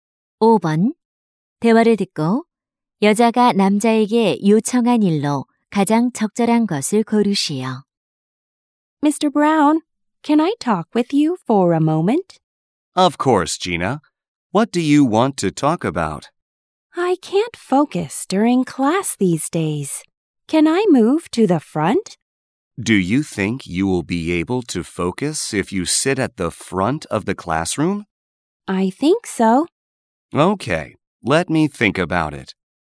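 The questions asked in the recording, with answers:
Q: 대화를 듣고 여자가 남자에게 요청한 일로 가장 적절한 것을 고르시오.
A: 앞자리로 자리 옮기기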